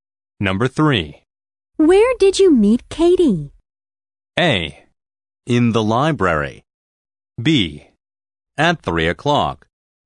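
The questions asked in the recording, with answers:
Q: Where did you meet Katie?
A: A: In the library.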